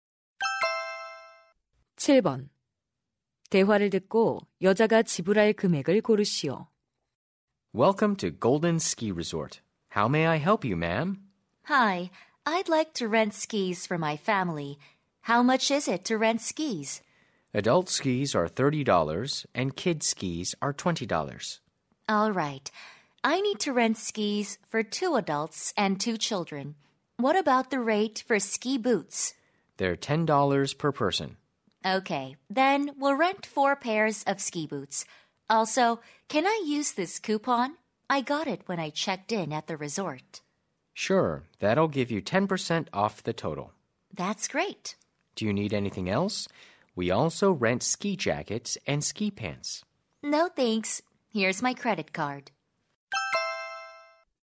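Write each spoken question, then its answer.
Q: 대화를 듣고 여자가 지불할 금액을 고르시오.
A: 126달러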